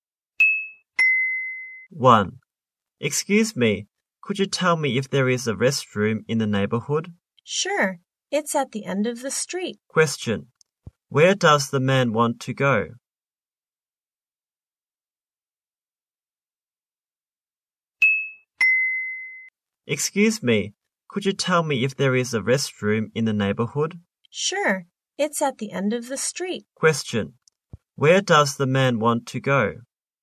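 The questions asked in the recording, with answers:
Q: Where does the man want to go?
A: A restroom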